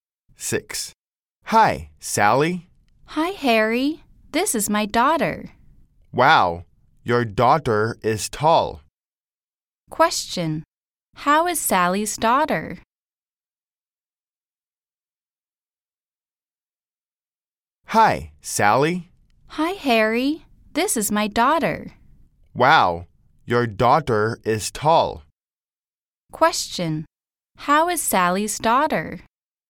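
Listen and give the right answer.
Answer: She is tall.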